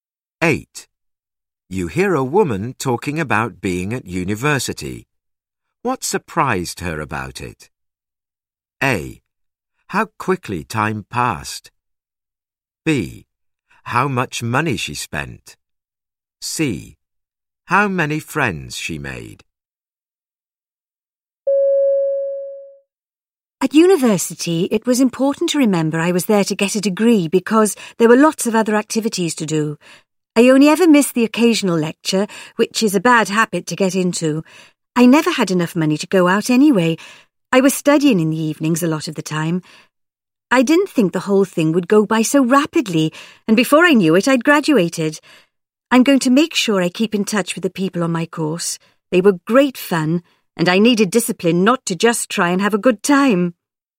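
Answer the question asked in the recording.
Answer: A: How quickly time passed.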